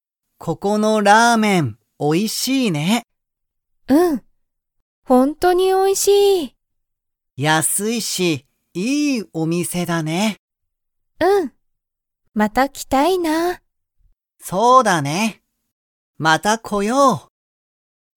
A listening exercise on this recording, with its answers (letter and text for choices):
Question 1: ここのラーメンは、____。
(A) 高(たか)い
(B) 大変(たいへん)だ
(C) おいしい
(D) きれい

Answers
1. (C) おいしい

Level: Level 1